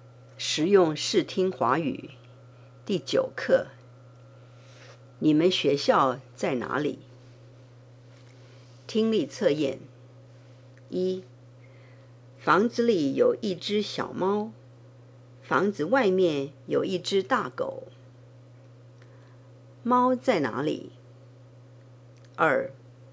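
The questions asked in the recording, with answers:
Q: 猫在哪里?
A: 在房子里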